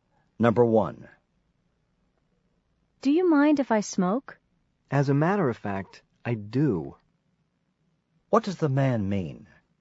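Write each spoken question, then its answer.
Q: What does the man mean?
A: He minds; he doesn't want the other person to smoke.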